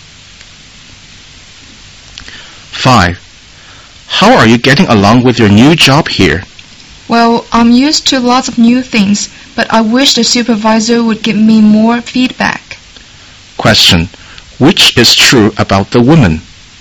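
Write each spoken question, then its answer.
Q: Which is true about the woman?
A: She wants more feedback from her supervisor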